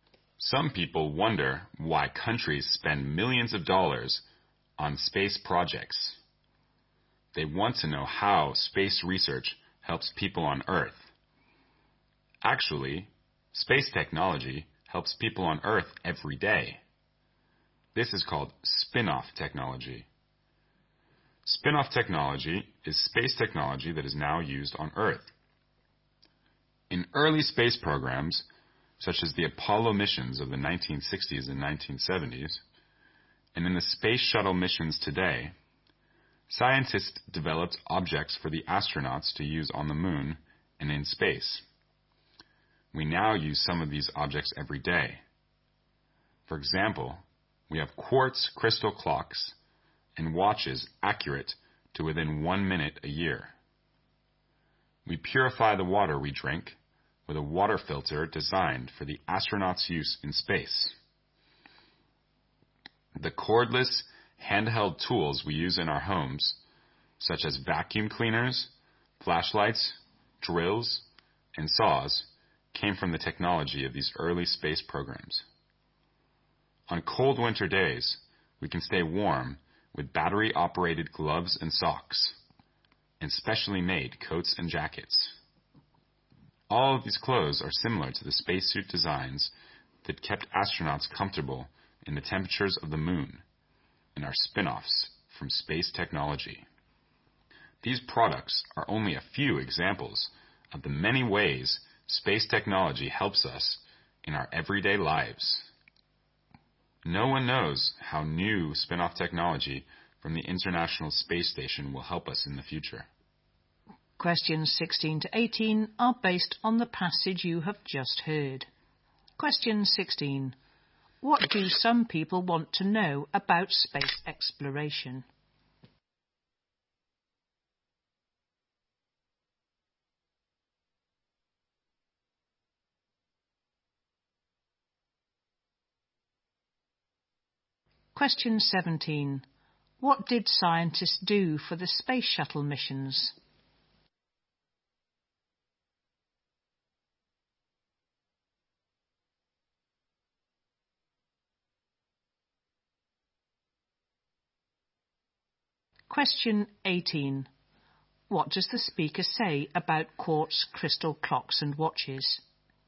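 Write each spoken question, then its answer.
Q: What do some people want to know about space exploration?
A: How space research helps people on Earth

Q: What did scientists do for the space shuttle missions?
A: They developed objects for astronauts to use in space

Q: What does the speaker say about quartz crystal clocks and watches?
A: They are accurate to within 1 minute a year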